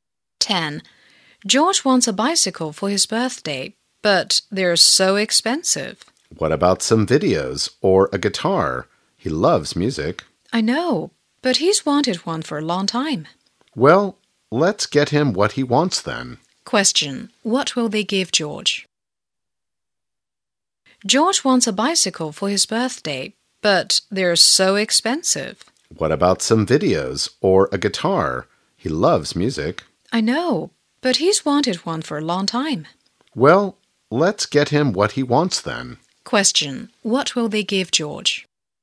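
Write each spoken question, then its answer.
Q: What will they give George?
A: A bicycle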